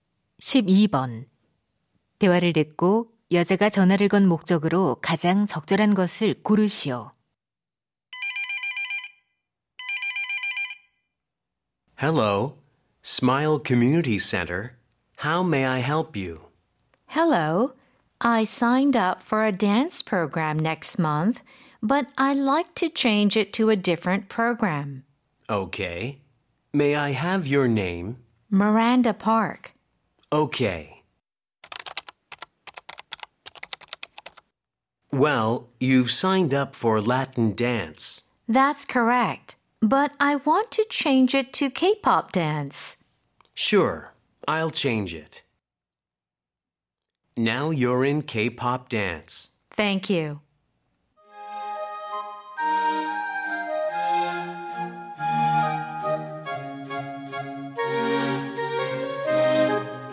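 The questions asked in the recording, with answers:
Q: 대화를 듣고 여자가 전화를 건 목적으로 가장 적절한 것을 고르시오.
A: 댄스 프로그램 변경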